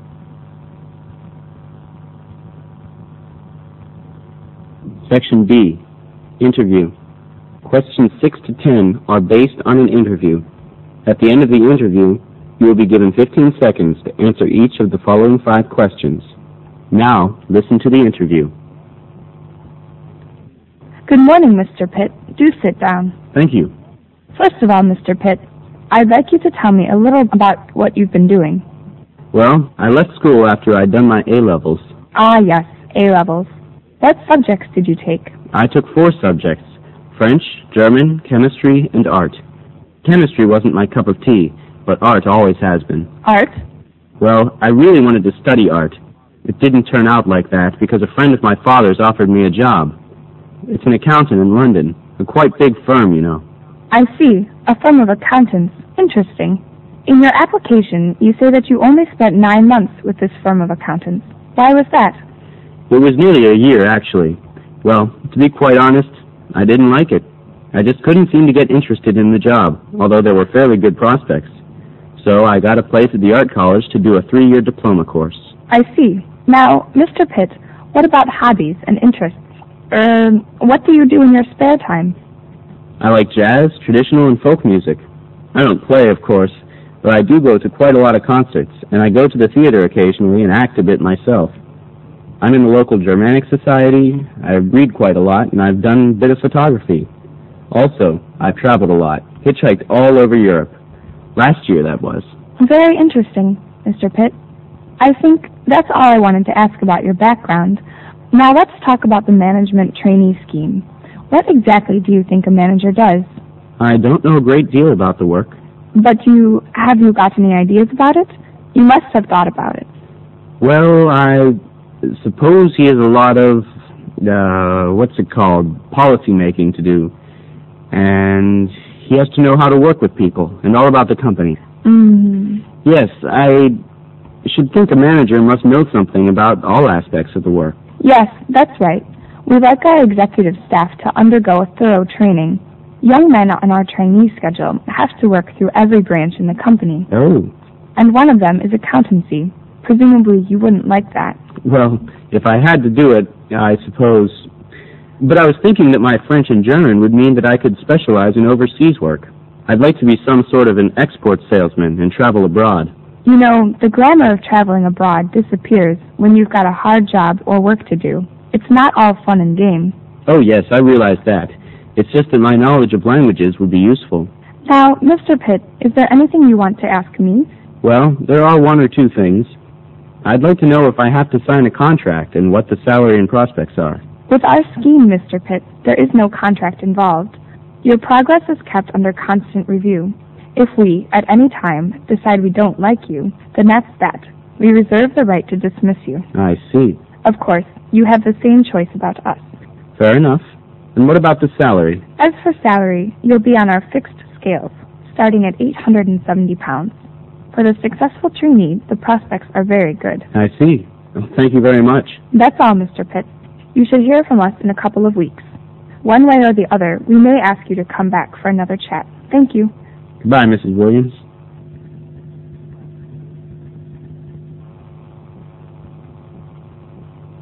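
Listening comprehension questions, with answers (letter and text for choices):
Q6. What subject is Mr. Pitt good at_____ ?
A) Art.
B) French.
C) German.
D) Chemistry.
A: A) Art.

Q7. What does Mr. Pitt NOT do in his spare time?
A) Doing a bit of acting and photography.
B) Going to concerts frequently.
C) Playing traditional jazz and folk music.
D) Traveling in Europe by hitch-hiking.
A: C) Playing traditional jazz and folk music.

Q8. When asked what a manager's role is Mr. Pitt sounds ___.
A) confident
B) hesitant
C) resolute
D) doubtful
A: B) hesitant

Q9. What does Mr. Pitt say he would like to be?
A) An export salesman working overseas.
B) An accountant working in the company.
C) A production manager in a branch.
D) A policy maker in the company.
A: A) An export salesman working overseas.

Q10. Which of the following statements about the management trainee scheme is TRUE?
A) Trainees are required to sign contracts initially.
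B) Trainees' performance is evaluated when necessary.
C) Trainees' starting salary is 870 pounds.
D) Trainees cannot quit the management scheme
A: C) Trainees' starting salary is 870 pounds.

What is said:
SECTION B INTERVIEW
Interviewer: Good morning Mr. Pitt. Do sit down.
Pitt: Thank you.
Interviewer: First of all, Mr. Pitt. I'd like you to tell me a bit about what you've been doing.
Pitt: Well, I left school after I'd done my A levels.
Interviewer: Ah, yes, A levels. What subjects did you take?
Pitt: I took four subjects, French, German, chemistry and art. Chemistry wasn't my cup of tea, but art has always been.
Interviewer: Art?
Pitt: Well, I really wanted to study art. It didn't turn out like that, because a friend of my fathers offered me a job. It's an accountant in London. A quite big firm, you know.
Interviewer: I see. A firm of accountants. Interesting. In your application, you say that you only spent nine months with this firm of accountants. 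Why was that?
Pitt: It was nearly a year actually. Well, to be quite honest, I didn't like it.
I just couldn't seem to get interested in the job although there were fairly good prospects. So I got a place at the art college to do a three-year diploma course.
Interviewer: I see. Now Mr. Pitt, what about hobbies and interests? Er, what do you do in your spare time?
Pitt: I like jazz, traditional and folk music. I don't play of course, but I go to quite a lot of concerts and I go to the theater occasionally and act a bit myself. I'm in the local Germanic society. I read quite a lot and I've done a bit of photography. Also, I've traveled a lot. Hitchhike a dolly for Europe. Last year that was.
Interviewer: Very interesting. Mr. Pitt. I think, that's all I wanted to ask about your background. Now let's talk about the management trainee scheme. What exactly do you think a manager does?
Pitt: I don't know a great deal about the work.
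Interviewer: But you have got any ideas about it. You must have thought about it.
Pitt: Well, I... Suppose he has a lot of... what is called policy making to do. And... he has to know how to work with people, and all about the company.
Interviewer: Mm.
Pitt: Yes, I... should think a manager must know something about all aspects of the work.Interviewer: Yes, that's right. We like our executive staff to undergo a thorough training. Young men on our trainee scheme have to work through every branch in the company.
Pitt: Oh.
Interviewer: And one of them is accountancy. Presumably you wouldn't like that.
Pitt: Well, if I had to do it, I suppose... But I was thinking that my French and German would mean that I could specialize in overseas work. I'd like to be some sort of an export salesman and travel abroad.
Interviewer: You know, the glamour of traveling abroad disappears when you've got a hard job of work to do. 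It's not all fun and game.
Pitt: Oh yes, I realize that. It's just that my knowledge of languages would be useful.
Interviewer: Now, Mr. Pitt, is there anything you want to ask me?
Pitt: Well, there is one or two things. I'd like to know if I have to sign a contract and what the salary and prospects are.
Interviewer: With our scheme, Mr. Pitt, there is no contract involved. Your progress is kept under constant review. If we at any time decide we don't like you, then that's that. We reserve the right to dismiss you.
Pitt: I see.
Interviewer: Of course. You have the same choice about us.
Pitt: Fair enough. And what about the salary?
Interviewer: As for salary, you'll be on our fixed scales, starting at 870 pounds. For the successful trainee, the prospects are very good.
Pitt: I see. Thank you very much.
Interviewer: That's all, Mr. Pitt. You should hear from us in a couple of weeks. One way or the other, or we may ask you to come back for another chat. 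Thank you.
Pitt: Goodbye, Mrs. Williams.
SECTION C NEWS BROADCAST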